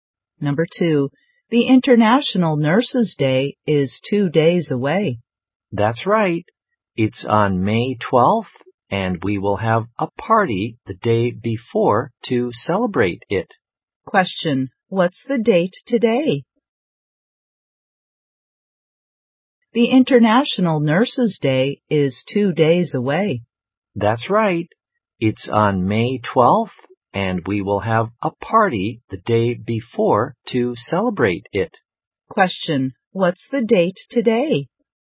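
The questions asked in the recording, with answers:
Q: what's the date today?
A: May 10th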